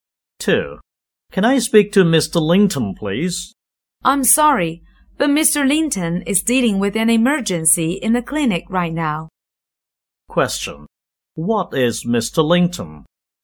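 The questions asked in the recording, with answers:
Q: What is Mr. Linton?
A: A doctor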